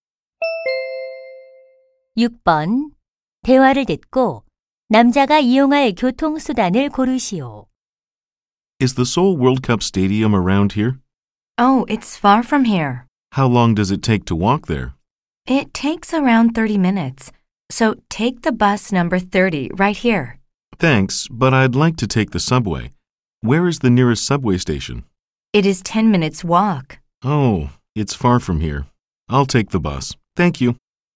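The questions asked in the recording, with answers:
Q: 대화를 듣고 남자가 이용할 교통수단을 고르시오.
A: 버스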